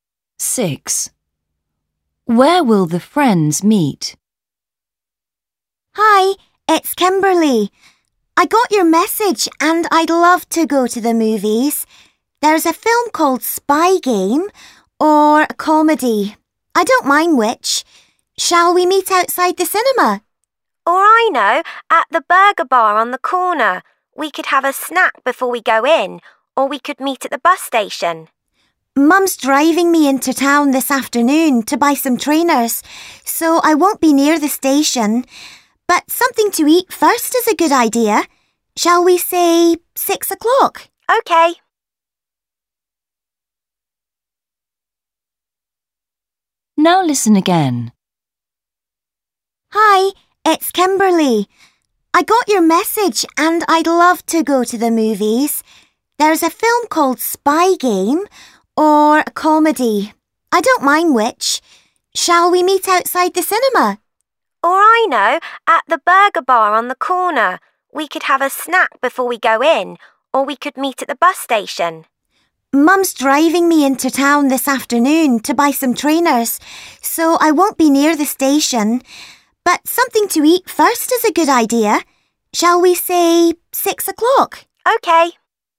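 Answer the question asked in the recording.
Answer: At the burger bar on the corner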